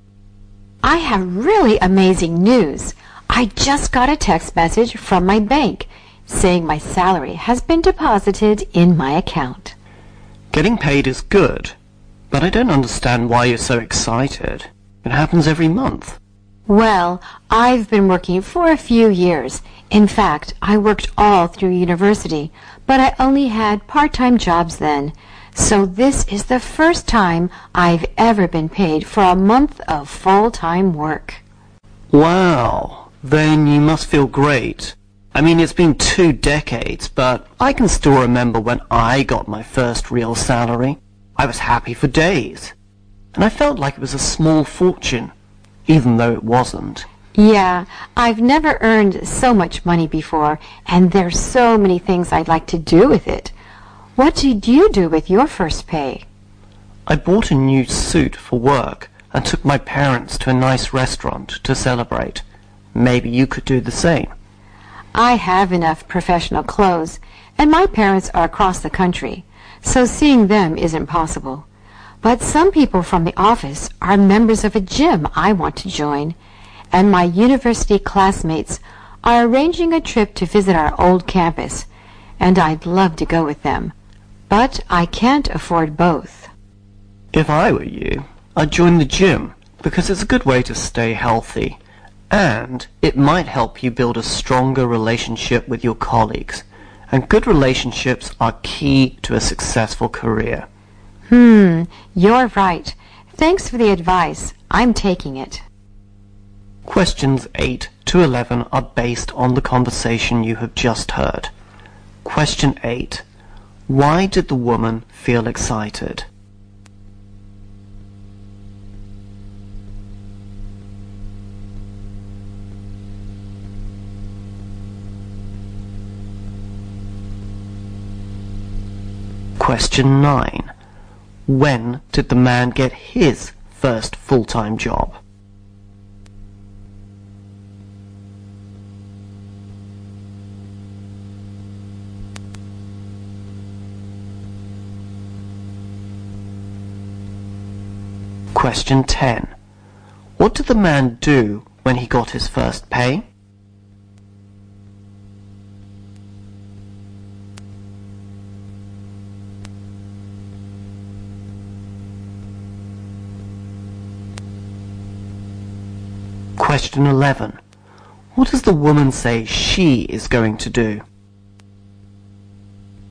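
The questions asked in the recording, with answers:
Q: Why did the woman feel excited?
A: She received her first full-time monthly salary.

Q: When did the man get his first full-time job?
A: About 20 years ago.

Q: What did the man do when he got his first pay?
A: He bought a new work suit and took his parents to a nice restaurant.

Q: What does the woman say she is going to do?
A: Join the gym.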